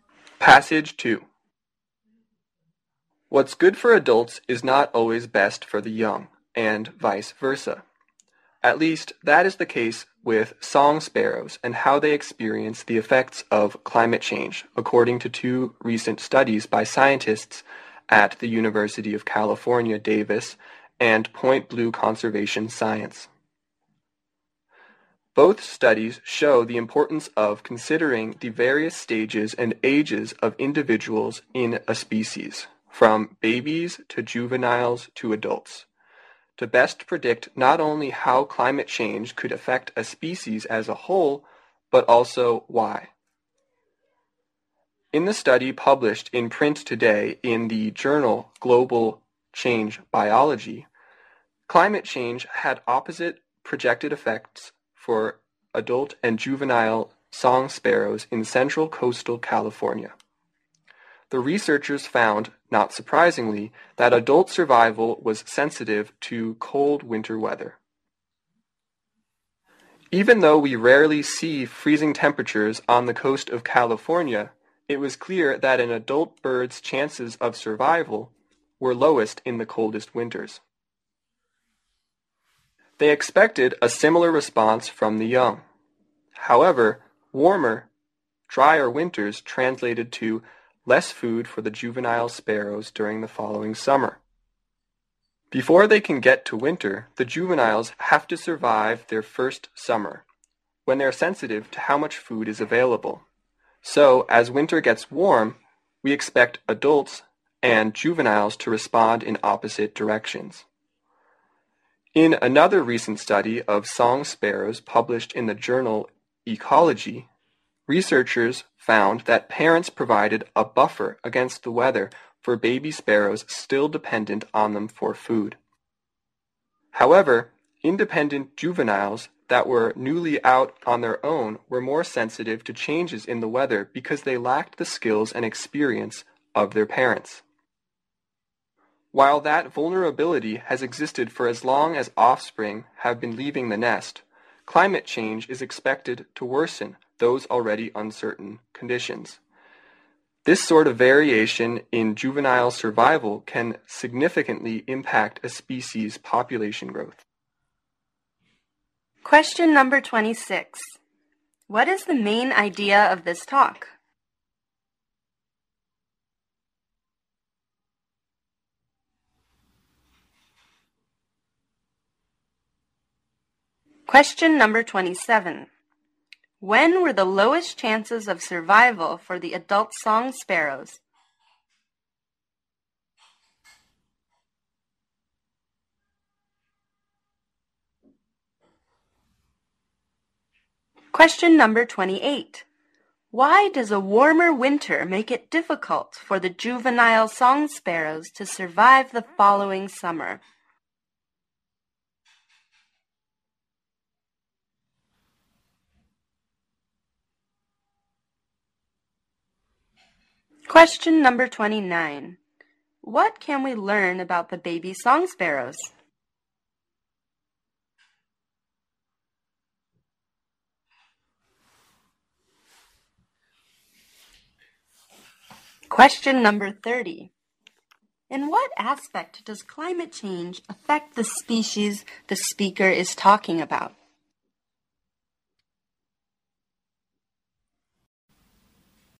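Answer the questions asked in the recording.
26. Climate change affects adult and juvenile song sparrows differently
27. In the coldest winters
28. Warmer, drier winters mean less food the following summer
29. Their parents buffer them against the weather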